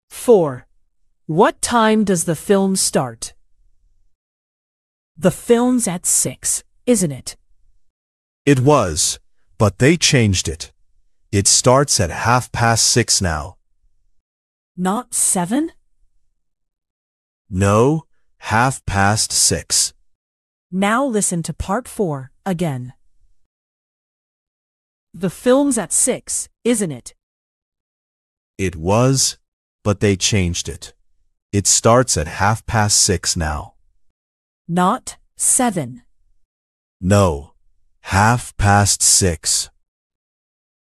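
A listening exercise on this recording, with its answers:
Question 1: What time does the film start?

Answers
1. half past six

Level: 劍橋兒童英檢 Flyers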